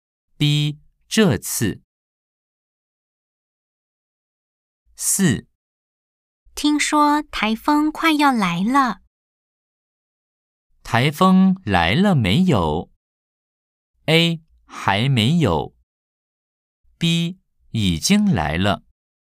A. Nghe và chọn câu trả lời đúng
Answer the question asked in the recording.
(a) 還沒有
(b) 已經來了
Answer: (a) 還沒有